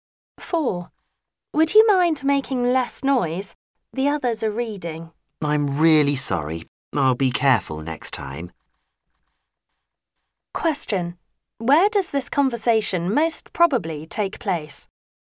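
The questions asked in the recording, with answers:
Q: Where does this conversation most probably take place?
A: In a library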